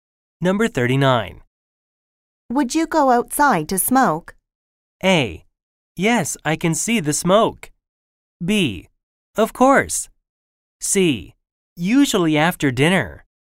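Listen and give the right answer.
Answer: B: Of course.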